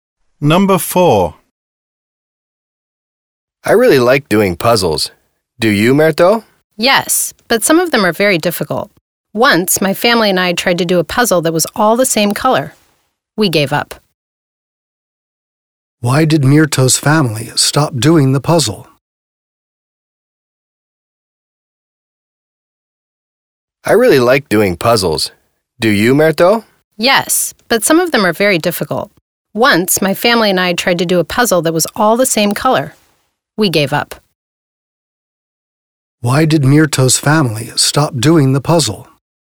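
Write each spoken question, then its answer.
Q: Why did Mirto's family stop doing the puzzle?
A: It was too difficult because it was all the same color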